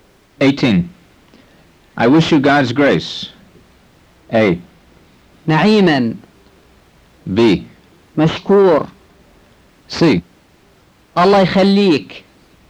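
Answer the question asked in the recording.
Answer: A: نعيما.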